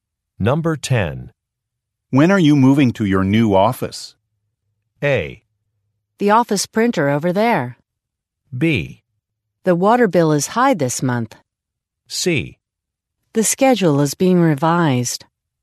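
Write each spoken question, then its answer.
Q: When are you moving to your new office?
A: C: The schedule is being revised.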